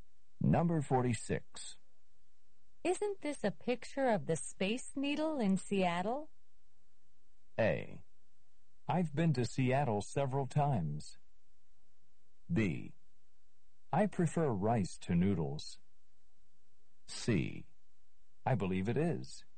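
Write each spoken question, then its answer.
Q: Isn't this a picture of the Space Needle in Seattle?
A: C: I believe it is.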